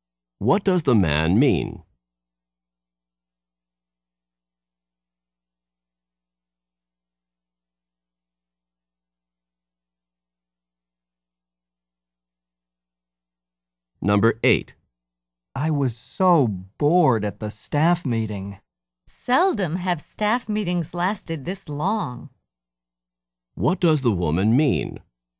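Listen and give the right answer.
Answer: Staff meetings are usually shorter.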